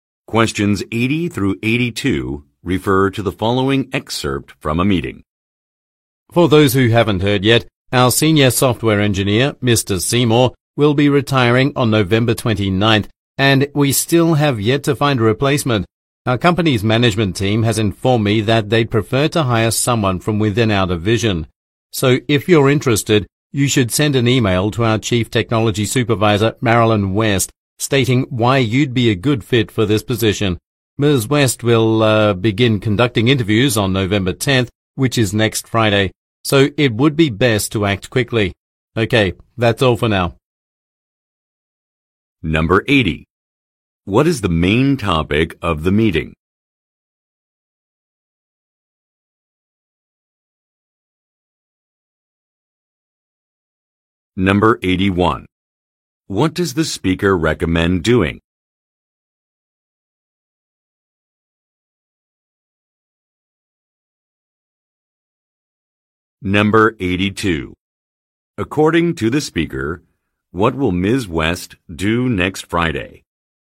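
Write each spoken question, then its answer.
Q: What is the main topic of the meeting?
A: A job opening to replace a retiring senior software engineer

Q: What does the speaker recommend doing?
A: Sending an email to Marilyn West if interested in the position

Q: According to the speaker, what will Ms. West do next Friday?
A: Begin conducting interviews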